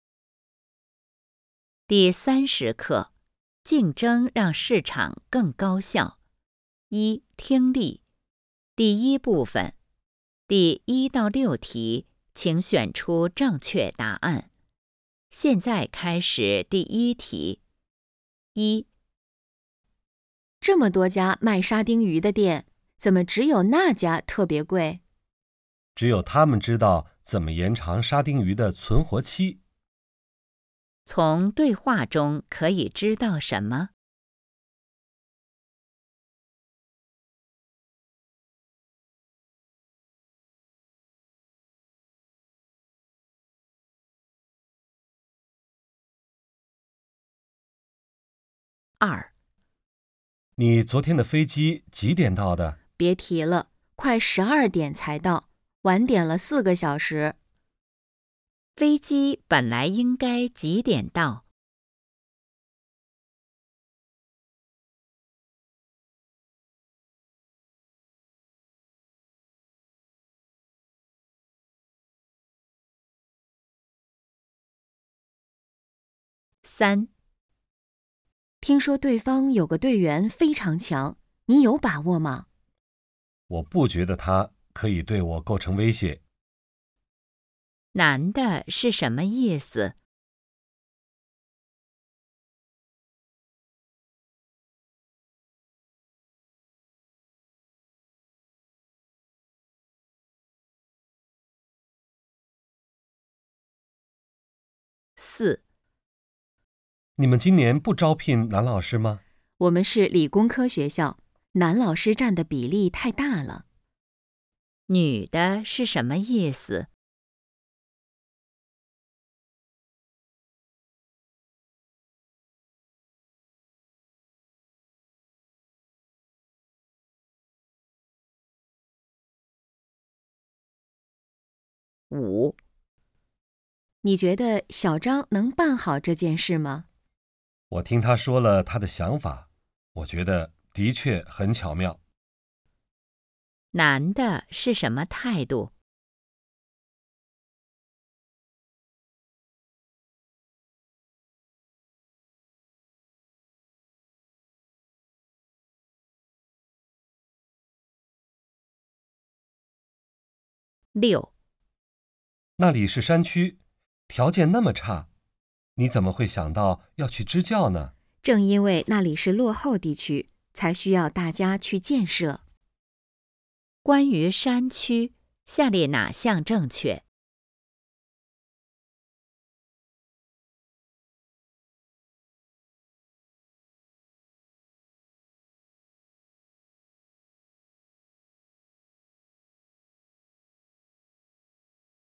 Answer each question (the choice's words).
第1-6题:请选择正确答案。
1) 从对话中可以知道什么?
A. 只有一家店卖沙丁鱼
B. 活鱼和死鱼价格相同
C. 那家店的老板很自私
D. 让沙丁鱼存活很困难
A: 让沙丁鱼存活很困难

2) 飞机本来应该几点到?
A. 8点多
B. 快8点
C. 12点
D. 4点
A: 快8点

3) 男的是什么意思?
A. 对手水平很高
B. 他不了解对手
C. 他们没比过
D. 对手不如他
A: 对手不如他

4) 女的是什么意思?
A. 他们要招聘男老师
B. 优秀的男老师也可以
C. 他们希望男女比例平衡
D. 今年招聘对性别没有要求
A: 他们希望男女比例平衡

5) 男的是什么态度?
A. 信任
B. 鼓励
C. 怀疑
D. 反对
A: 信任

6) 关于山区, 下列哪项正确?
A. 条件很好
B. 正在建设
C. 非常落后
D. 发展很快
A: 非常落后

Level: HSK 5